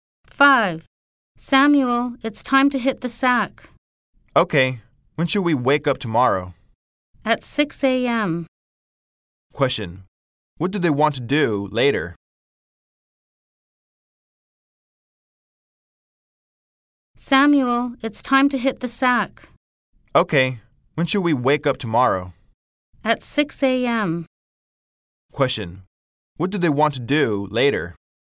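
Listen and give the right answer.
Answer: Go to bed.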